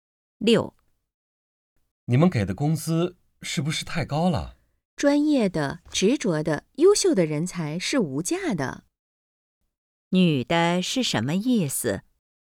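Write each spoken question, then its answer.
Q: 女的是什么意思?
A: 工资不算高,优秀人才是无价的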